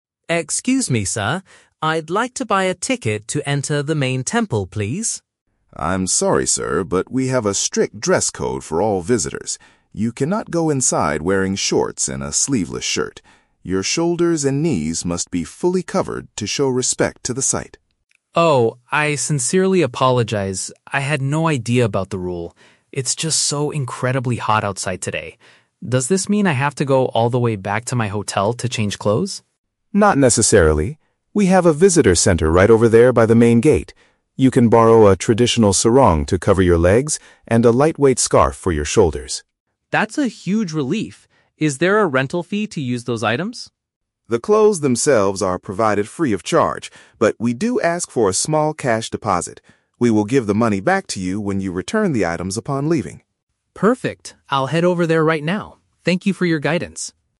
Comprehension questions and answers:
Listen to the conversation between a tourist and a temple guard. Choose the correct answer (A, B, or C) for each question.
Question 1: Why does the guard stop the tourist from entering the temple?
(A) Because the tourist forgot to purchase an entrance ticket.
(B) Because the tourist's current clothing is considered disrespectful.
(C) Because the main temple is temporarily closed due to the hot weather.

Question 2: What is the tourist's immediate concern after hearing the rule?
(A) He is worried that he might need to return to his accommodation.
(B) He is frustrated because he cannot afford the expensive rental fee.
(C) He is confused about how to properly wear a traditional sarong.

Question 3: What is the policy for using the temple's cover-up clothing?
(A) Visitors must pay a small, non-refundable rental charge.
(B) Visitors must buy the garments directly from the visitor center.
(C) Visitors must leave some money which will be refunded later.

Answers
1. B
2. A
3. C

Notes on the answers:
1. The guard states there is a "strict dress code" and the tourist's shoulders and knees must be covered "to show respect" (meaning his current shorts and sleeveless shirt are disrespectful). Option (A) is a trap; the tourist asks to "buy a ticket", but that's not why he is stopped. Option (C) is a trap; the tourist mentions it is "hot outside", but the temple isn't closed.
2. The tourist asks, "Does this mean I have to go all the way back to my hotel to change clothes?" (return to his accommodation). Option (B) is a trap; the clothes are free, and he hasn't heard about the deposit yet. Option (C) is a trap; he hasn't even seen the sarong yet, so he isn't confused about wearing it.
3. The guard says they ask for a "small cash deposit" (leave some money) and will "give the money back to you" (refunded later). Option (A) is a trap; the tourist asks about a "rental fee", but the guard says it is "free of charge" and only requires a deposit. Option (B) is incorrect because they "borrow" the clothes, not buy them.

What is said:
Tourist: Excuse me, sir. I'd like to buy a ticket to enter the main temple, please.
Guard: I'm sorry, sir, but we have a strict dress code for all visitors. You cannot go inside wearing shorts and a sleeveless shirt. Your shoulders and knees must be fully covered to show respect to the site.
Tourist: Oh, I sincerely apologize. I had no idea about the rule. It's just so incredibly hot outside today. Does this mean I have to go all the way back to my hotel to change clothes?
Guard: Not necessarily. We have a visitor center right over there by the main gate. You can borrow a traditional sarong to cover your legs and a lightweight scarf for your shoulders.
Tourist: That's a huge relief! Is there a rental fee to use those items?
Guard: The clothes themselves are provided free of charge, but we do ask for a small cash deposit. We will give the money back to you when you return the items upon leaving.
Tourist: Perfect. I'll head over there right now. Thank you for your guidance.

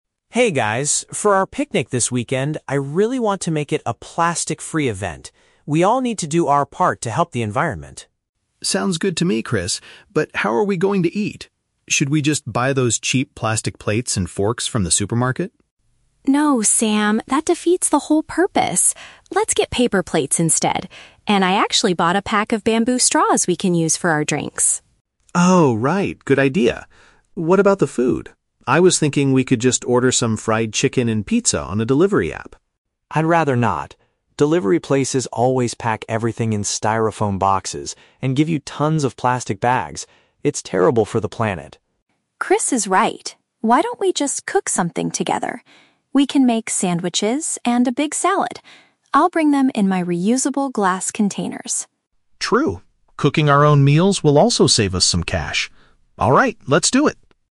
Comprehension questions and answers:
Listen to three friends planning a picnic and choose the correct answer (A, B, or C) for each question.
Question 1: What are the friends mainly trying to achieve for their picnic?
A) To find the cheapest supermarket to buy supplies.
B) To organize an event without using any plastic items.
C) To clean up a local park and pick up trash.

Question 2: What is Maya providing for the drinks?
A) Straws made from a natural material.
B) Reusable glass bottles.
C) Cheap plastic cups.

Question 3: Why does Chris reject the idea of ordering food via a delivery app?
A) Because he wants to save money on the delivery fee.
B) Because home-cooked meals are much healthier for them.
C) Because the packaging creates too much harmful waste.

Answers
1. B
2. A
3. C

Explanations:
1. Chris says at the beginning that he wants to make the picnic a "plastic-free event." (Paraphrasing: plastic-free = without using any plastic items).
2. Maya says she bought a pack of "bamboo straws" for their drinks. Bamboo is a natural material.
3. Chris does not want delivery food because restaurants use "styrofoam boxes" and "tons of plastic bags," which is "terrible for the planet." (Paraphrasing: styrofoam boxes and plastic bags = packaging / harmful waste).

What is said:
Chris: Hey guys, for our picnic this weekend, I really want to make it a plastic-free event. We all need to do our part to help the environment.
Sam: Sounds good to me, Chris. But how are we going to eat? Should we just buy those cheap plastic plates and forks from the supermarket?
Maya: No, Sam, that defeats the whole purpose! Let's get paper plates instead. And I actually bought a pack of bamboo straws we can use for our drinks.
Sam: Oh, right. Good idea. What about the food? I was thinking we could just order some fried chicken and pizza on a delivery app.
Chris: I'd rather not. Delivery places always pack everything in styrofoam boxes and give you tons of plastic bags. It's terrible for the planet.
Maya: Chris is right. Why don't we just cook something together? We can make sandwiches and a big salad. I'll bring them in my reusable glass containers.
Sam: True. Cooking our own meals will also save us some cash. Alright, let's do it!

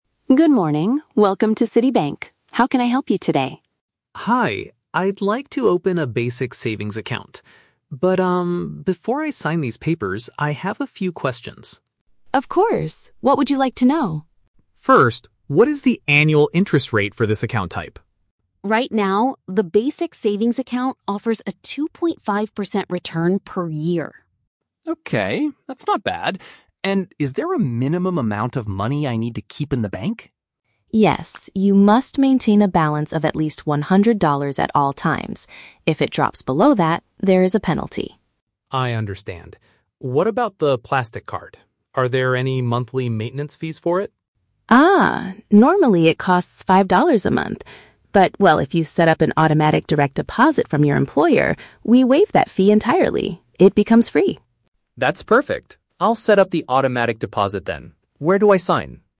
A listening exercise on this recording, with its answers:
Listen to a conversation between a customer and a bank teller, then choose the correct answer (A, B, or C) for each question.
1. What financial benefit does this specific bank account provide?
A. It offers a five percent discount on all monthly banking fees.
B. It gives a yearly return of two point five percent on the money.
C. It rewards the customer with a one hundred dollar signup bonus.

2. What rule must the customer follow to avoid getting a financial penalty?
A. He must ensure his account always has a hundred dollars or more.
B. He must use his plastic card to buy things at least once a month.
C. He must sign all the bank paperwork before the end of the day.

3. How can the man avoid paying the regular monthly charge for his card?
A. By paying a one-time penalty fee of five dollars today.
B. By asking his company to send his salary straight to the bank.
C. By keeping his total savings balance below one hundred dollars.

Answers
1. B
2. A
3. B

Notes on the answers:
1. The teller says the account "offers a 2.5% return per year." "Yearly return" is a paraphrase for "return per year" and "annual interest rate".
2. The teller explains that he must "maintain a balance of at least one hundred dollars at all times." If it drops below that, there is a penalty.
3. The teller explains that the fee is waived (becomes free) if the customer sets up an "automatic direct deposit from your employer." Asking his company to send his salary straight to the bank is a strong paraphrase of this action.

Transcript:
Teller: Good morning. Welcome to City Bank. How can I help you today?
Customer: Hi, I'd like to open a basic savings account. But, um, before I sign these papers, I have a few questions.
Teller: Of course! What would you like to know?
Customer: First, what is the annual interest rate for this account type?
Teller: Right now, the basic savings account offers a 2.5% return per year.
Customer: Okay, that's not bad. And is there a minimum amount of money I need to keep in the bank?
Teller: Yes, you must maintain a balance of at least one hundred dollars at all times. If it drops below that, there is a penalty.
Customer: I understand. What about the plastic card? Are there any monthly maintenance fees for it?
Teller: Ah, normally it costs five dollars a month. But, well, if you set up an automatic direct deposit from your employer, we waive that fee entirely. It becomes free.

